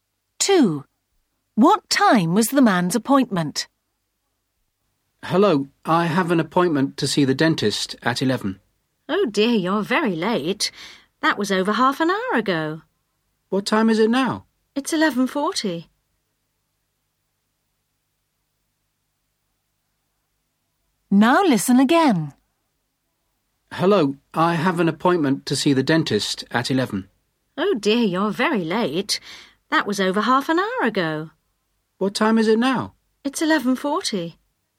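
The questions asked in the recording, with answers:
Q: What time was the man's appointment?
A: 11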